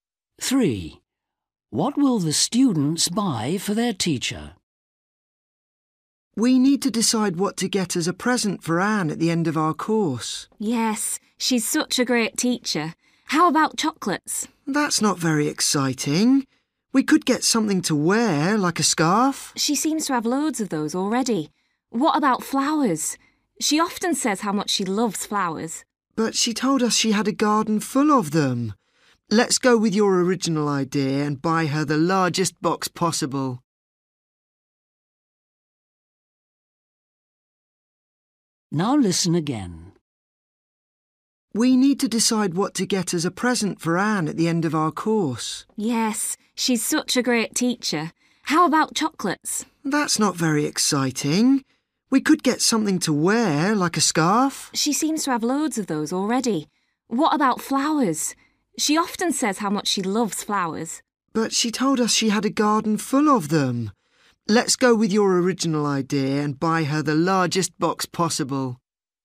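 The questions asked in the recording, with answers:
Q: What will the students buy for their teacher?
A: a box of chocolates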